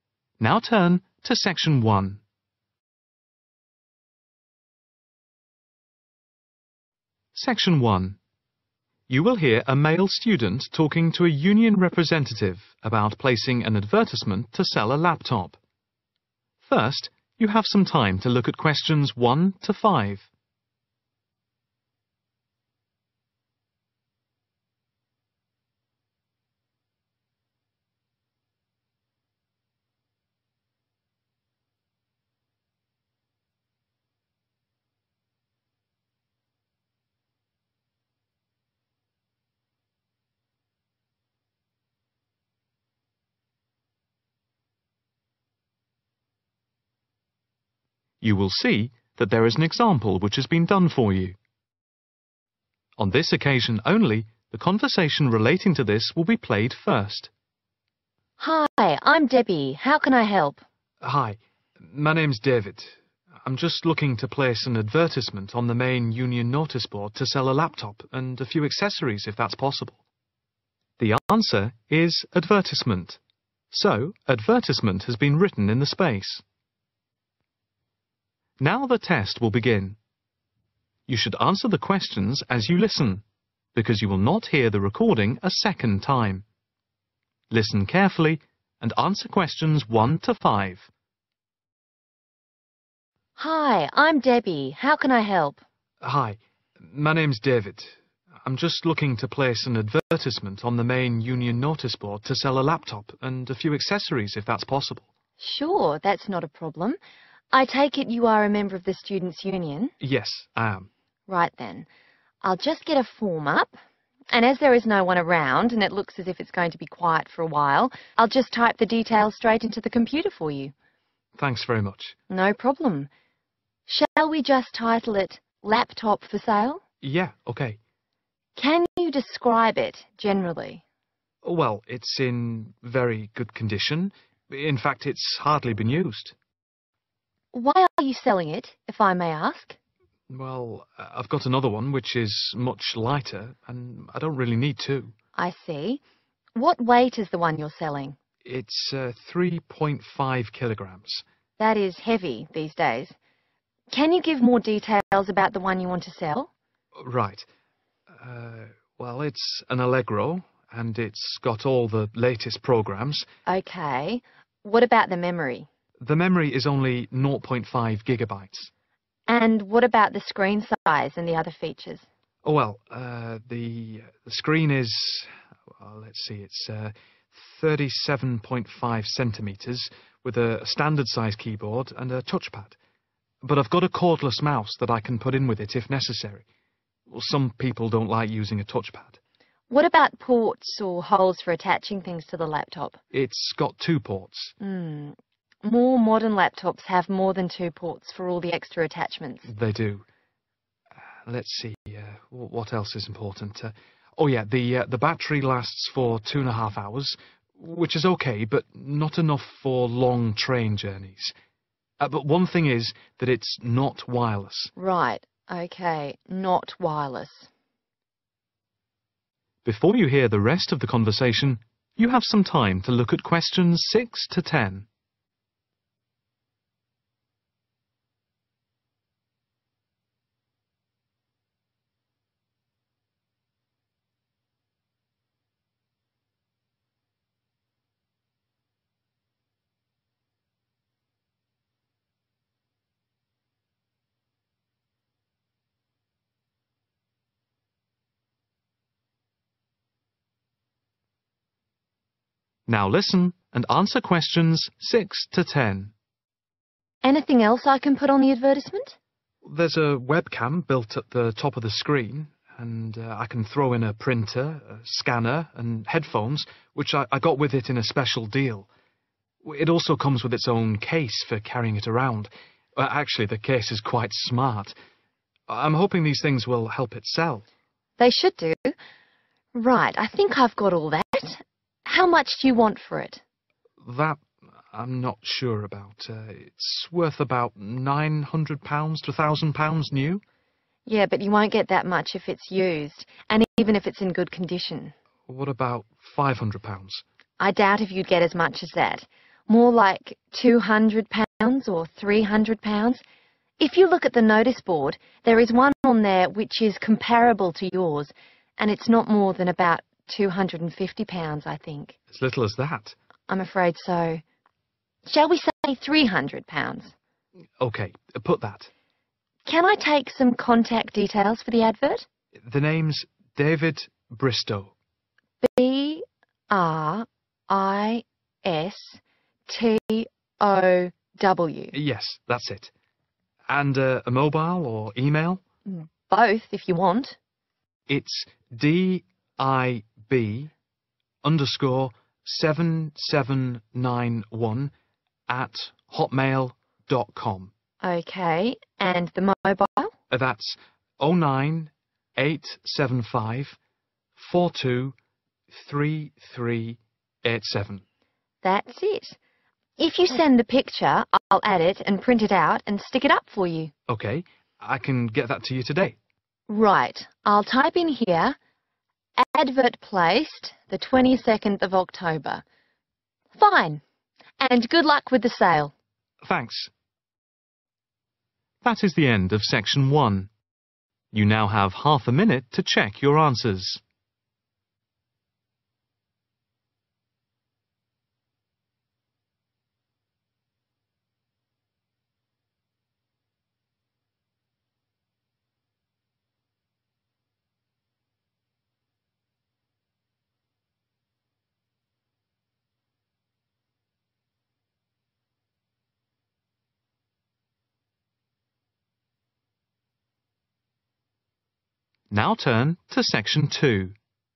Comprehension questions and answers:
Complete the notes below. Write NO MORE THAN THREE WORDS AND/OR A NUMBER for each answer.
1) Weight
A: 3.5 kg/kilogrammes/kilograms

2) Memory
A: 0.5/nought point five GB/gigabytes

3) Screen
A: 37.5 cm

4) Battery lasts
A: 21⁄2

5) Not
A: wireless

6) Printer with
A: scanner and headphones

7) Price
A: £300/Three hundred pounds

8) Name:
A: Bristow

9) Mobile number:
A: 09875 42 33 87

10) Advert placed:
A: 22nd October